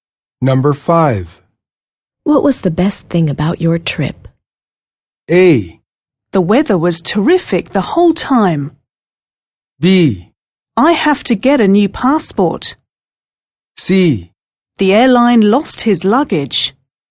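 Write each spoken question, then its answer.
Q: What was the best thing about your trip?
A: A: The weather was terrific the whole time.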